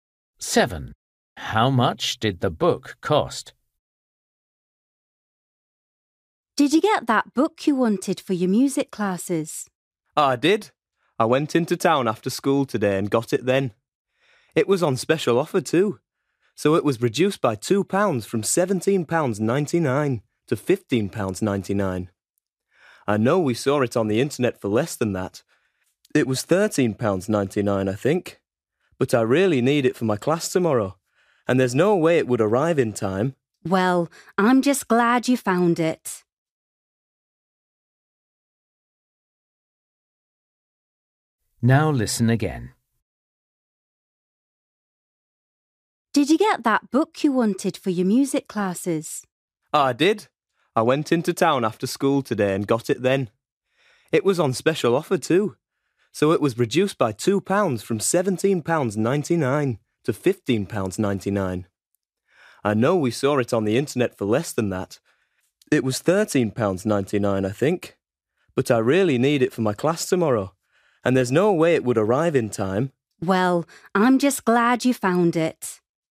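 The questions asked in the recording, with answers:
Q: How much did the book cost?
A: £15.99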